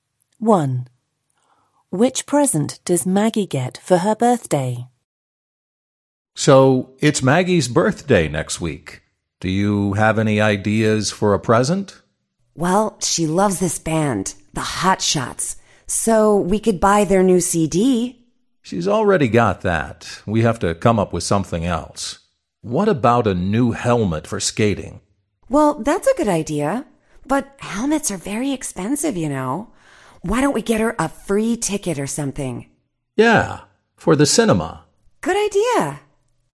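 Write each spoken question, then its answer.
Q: Which present does Maggie get for her birthday?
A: A cinema ticket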